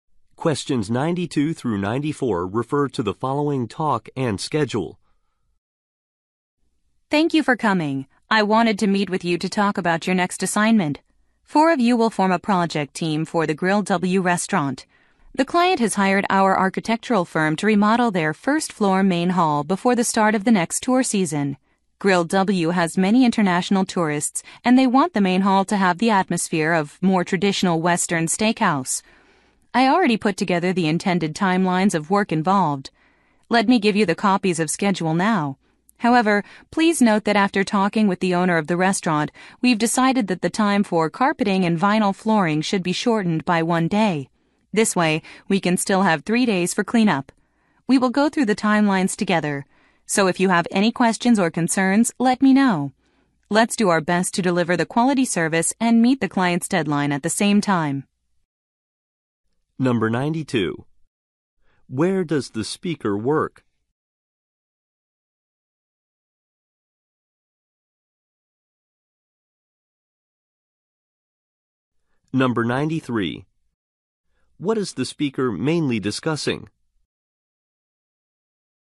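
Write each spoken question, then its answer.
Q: Where does the speaker work?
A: At an architectural firm

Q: What is the speaker mainly discussing?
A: A restaurant remodeling project assignment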